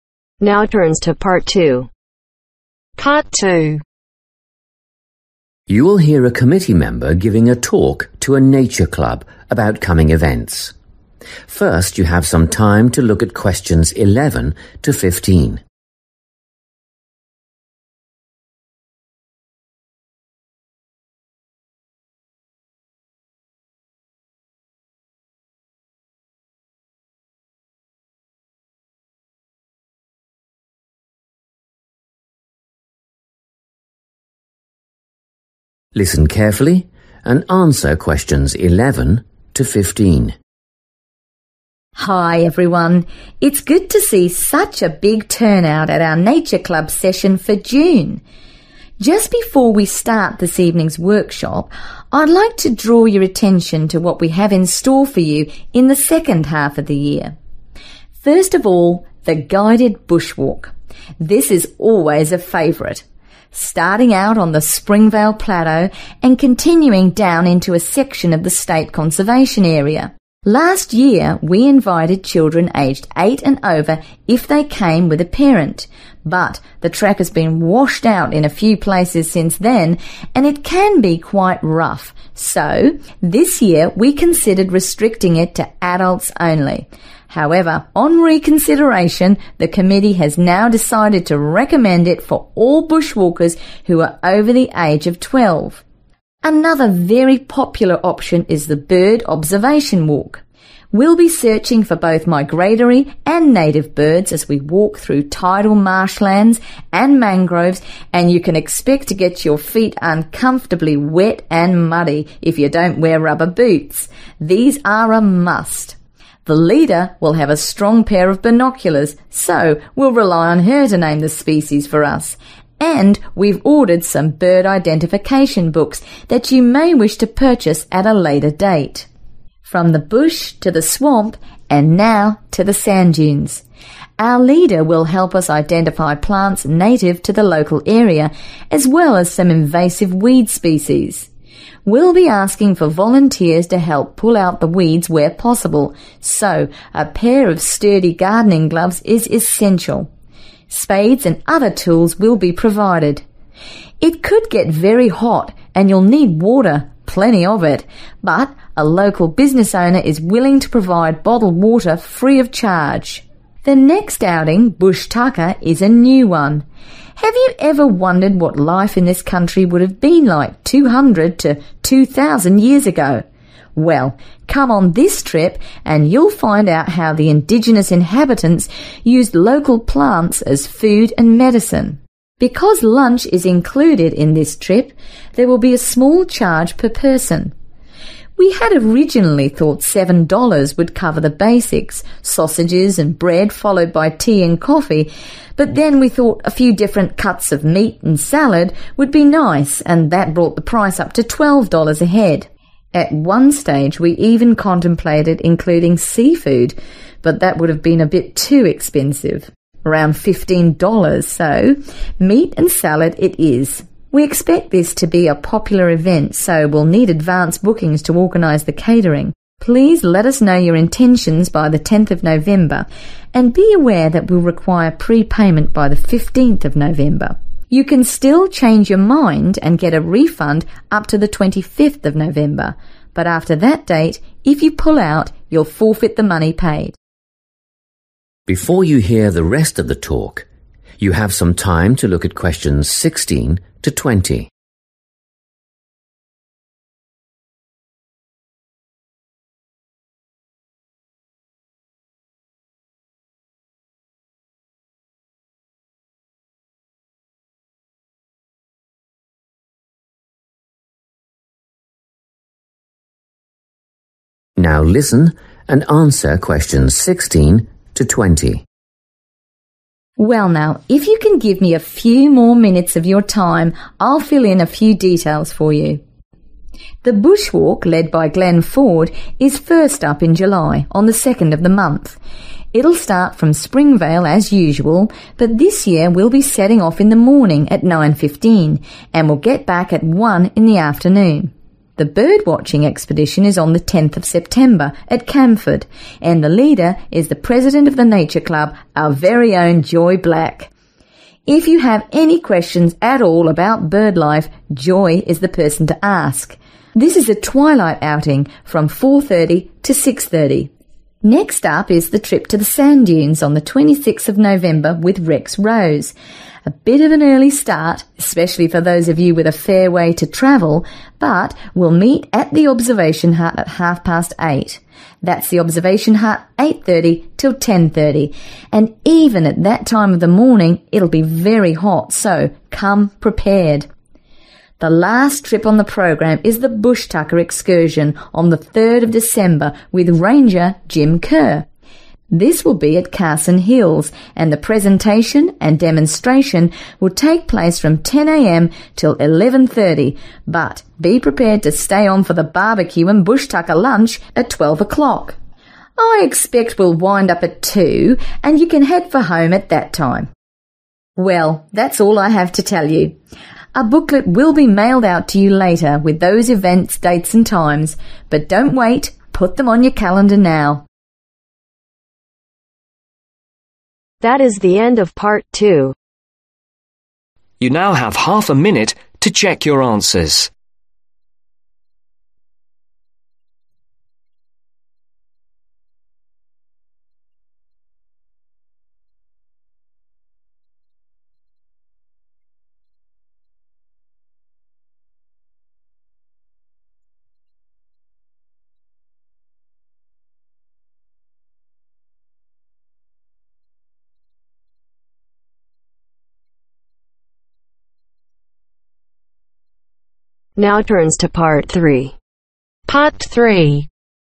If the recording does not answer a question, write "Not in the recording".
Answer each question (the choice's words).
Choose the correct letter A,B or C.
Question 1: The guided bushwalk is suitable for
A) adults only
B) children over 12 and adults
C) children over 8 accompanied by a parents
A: children over 12 and adults

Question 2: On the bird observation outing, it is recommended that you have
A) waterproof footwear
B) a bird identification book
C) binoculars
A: waterproof footwear

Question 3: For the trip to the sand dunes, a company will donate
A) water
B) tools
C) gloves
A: water

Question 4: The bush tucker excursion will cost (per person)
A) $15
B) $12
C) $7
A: $12

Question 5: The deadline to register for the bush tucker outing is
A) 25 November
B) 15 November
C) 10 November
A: 10 November

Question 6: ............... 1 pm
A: 9.15

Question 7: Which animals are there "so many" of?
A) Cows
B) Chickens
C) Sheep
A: Not in the recording

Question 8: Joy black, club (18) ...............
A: PRESIDENT

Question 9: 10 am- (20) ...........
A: 2 pm